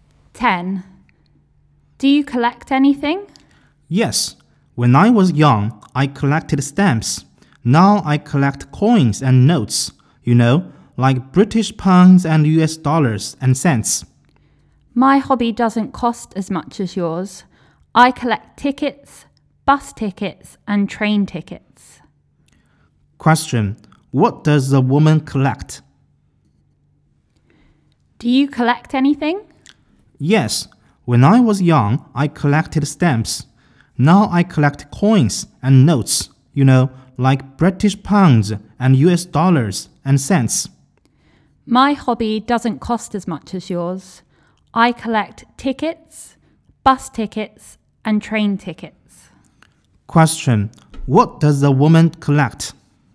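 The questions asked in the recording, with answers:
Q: What does the woman collect?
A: Tickets (bus and train tickets)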